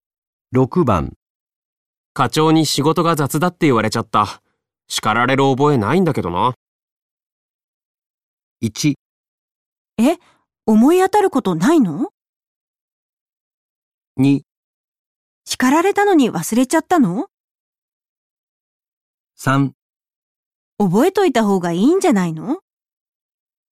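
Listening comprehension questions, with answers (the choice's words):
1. 課長に仕事が雑だって言われちゃった。叱られる覚えないんだけどな。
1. えっ、思い当たること、ないの。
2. 叱られたのに、忘れちゃったの。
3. 覚えといたほうがいいんじゃないの。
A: えっ、思い当たること、ないの。

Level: N1级别听力题库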